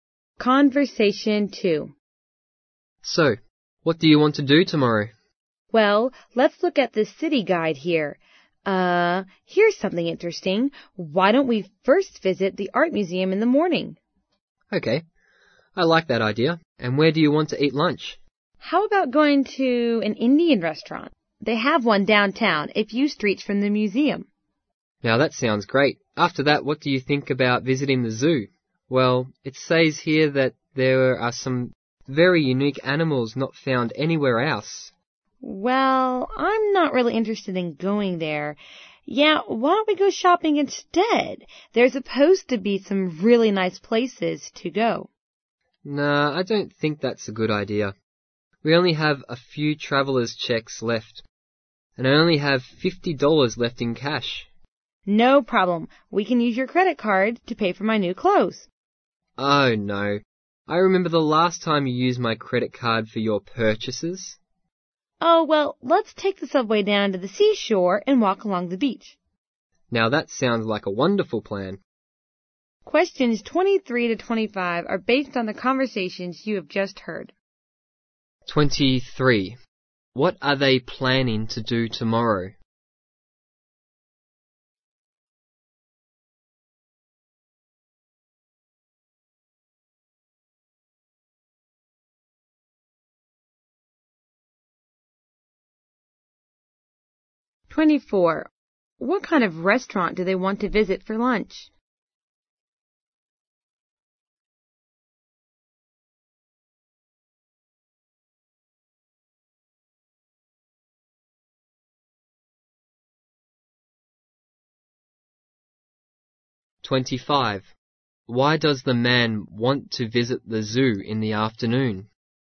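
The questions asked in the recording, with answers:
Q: What kind of restaurant do they want to visit for lunch?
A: An Indian restaurant

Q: Why does the man want to visit the zoo in the afternoon?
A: It has unique animals not found anywhere else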